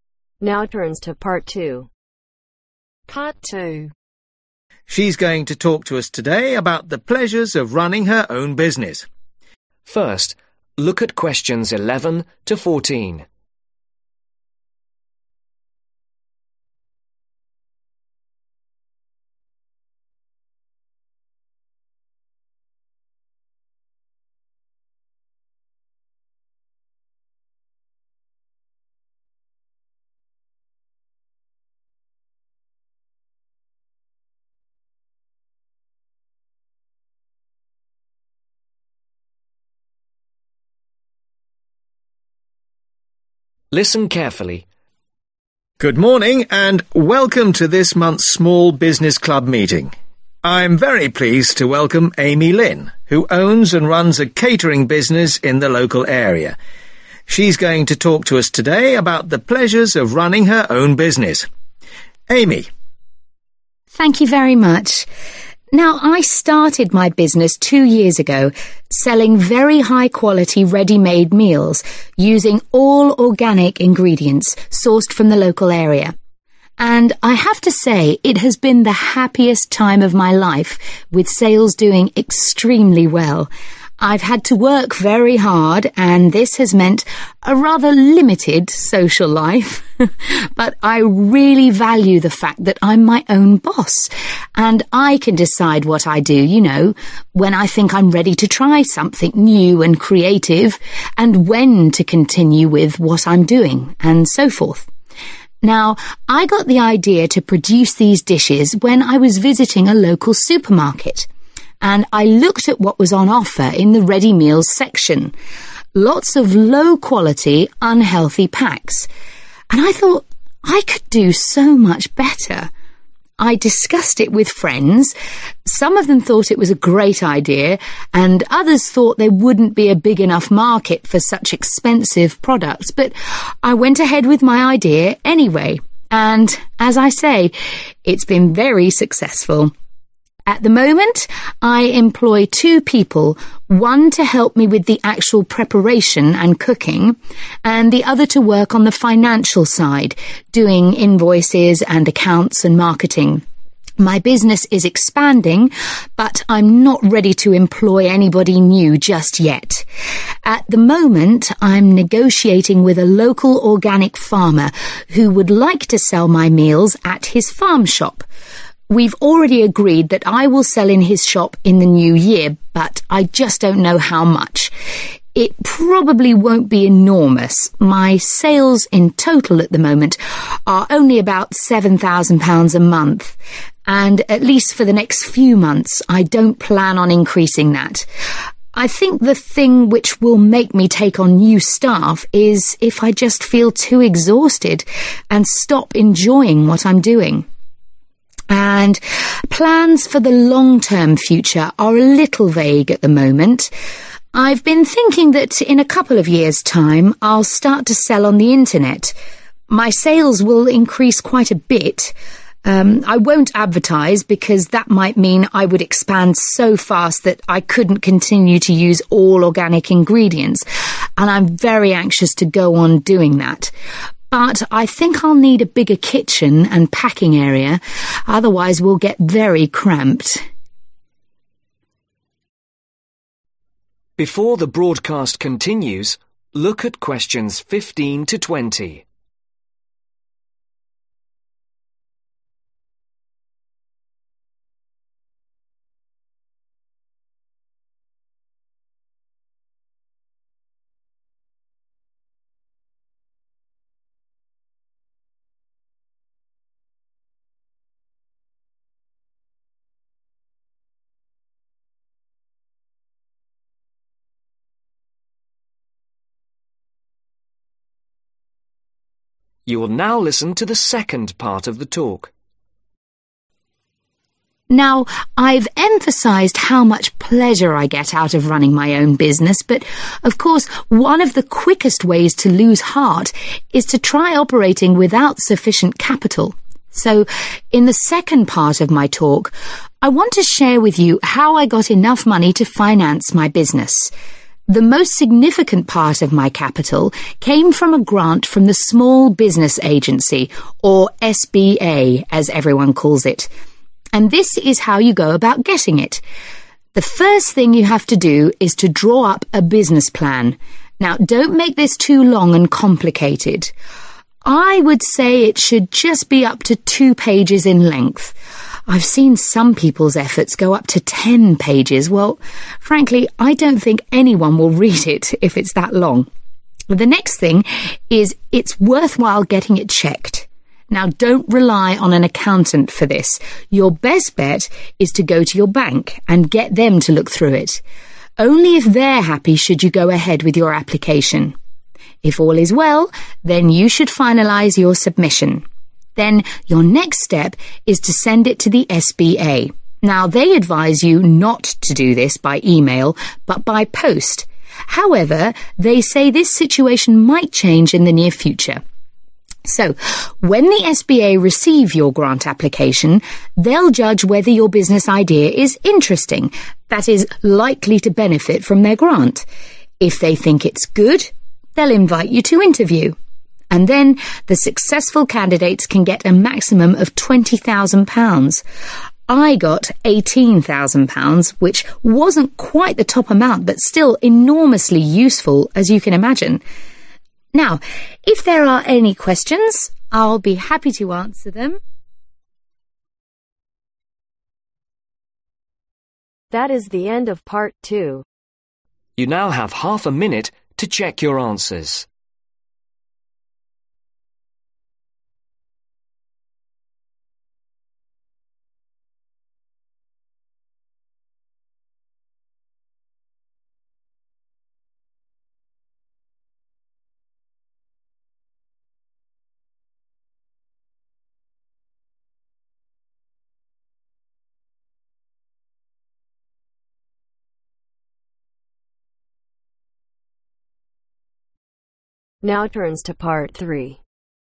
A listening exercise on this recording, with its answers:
Choose the correct letter A , B or C.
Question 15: Device a business (15)............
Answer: Plan

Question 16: (Maximum (16)............ pages)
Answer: 2

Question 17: Ask a (17)............ to check it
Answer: Bank

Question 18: Send it to SBA by (18)............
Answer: Post 0r Mail

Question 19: Go to (19)............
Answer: Interview

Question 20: Receive up to (20) £ ............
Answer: 20,000